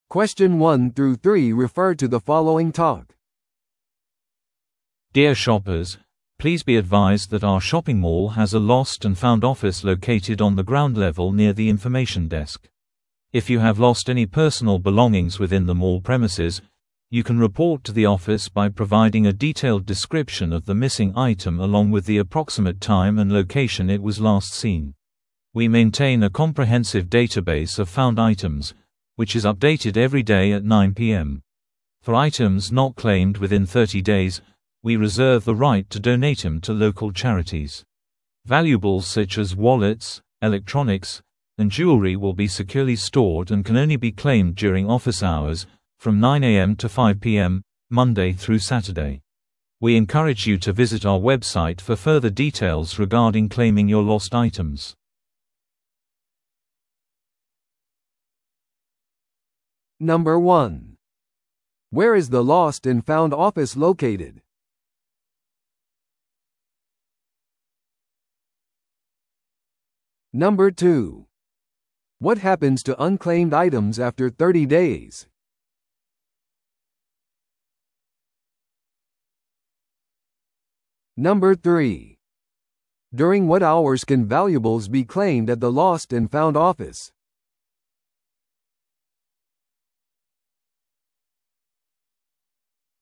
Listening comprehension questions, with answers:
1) Where is the lost-and-found office located?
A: 情報デスクの近くの地上階に

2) What happens to unclaimed items after 30 days?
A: 地元の慈善団体に寄付されます

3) During what hours can valuables be claimed at the lost-and-found office?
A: 月曜日から土曜日までの午前9時から午後5時

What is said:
Dear shoppers, please be advised that our shopping mall has a lost-and-found office located on the ground level near the information desk. If you have lost any personal belongings within the mall premises, you can report to the office by providing a detailed description of the missing item along with the approximate time and location it was last seen. We maintain a comprehensive database of found items, which is updated every day at 9pm. For items not claimed within 30 days, we reserve the right to donate them to local charities. Valuables such as wallets, electronics, and jewelry will be securely stored and can only be claimed during office hours, from 9am to 5pm, Monday through Saturday. We encourage you to visit our website for further details regarding claiming your lost items.